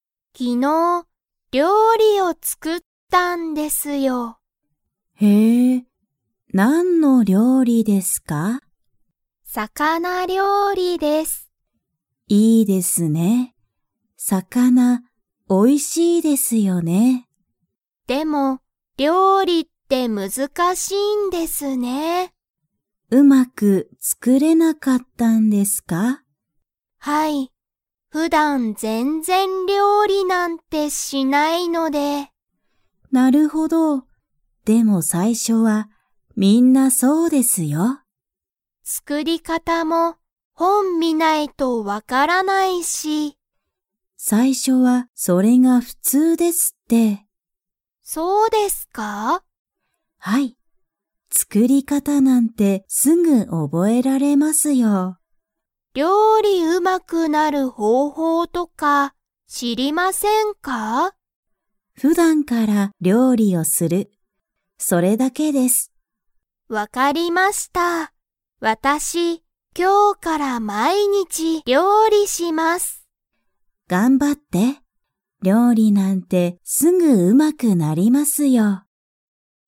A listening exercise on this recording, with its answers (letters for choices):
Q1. 木村きむらさんは、料理りょうりをうまく作つくれましたか?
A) 作つくれた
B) 作つくれなかった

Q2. 木村きむらさんは、今日きょうから 料理りょうりする。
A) 一回いっかい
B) 毎日まいにち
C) 少すこし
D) 三日みっかだけ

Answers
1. B
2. B

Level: Level 3